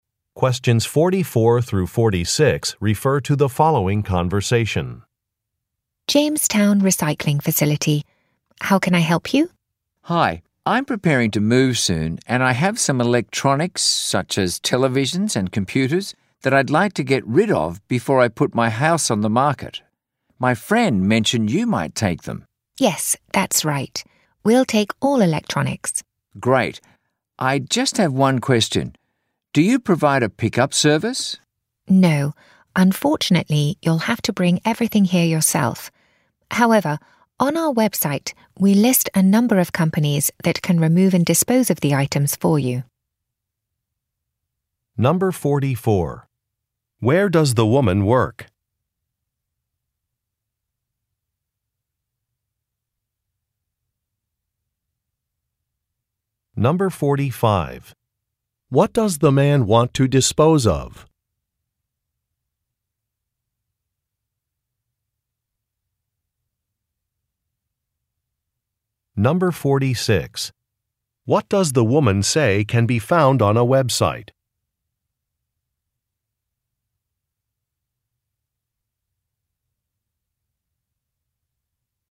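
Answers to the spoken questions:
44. At a recycling facility
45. Electronics such as televisions and computers
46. A list of companies that can remove and dispose of the items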